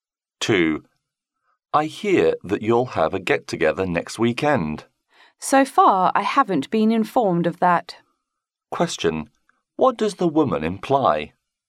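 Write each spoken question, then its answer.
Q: What does the woman imply?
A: She hasn't been told about the get-together.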